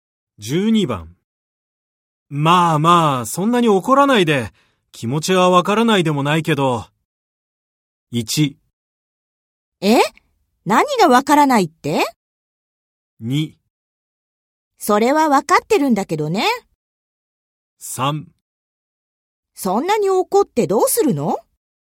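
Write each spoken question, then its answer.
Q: まあまあ、そんなに怒らないで。気持ちはわからないでもないけど。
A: 2: それはわかってるんだけどね。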